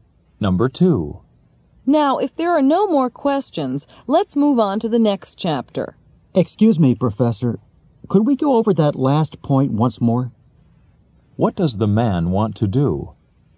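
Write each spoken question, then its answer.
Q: What does the man want to do?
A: Have the professor explain the last point again.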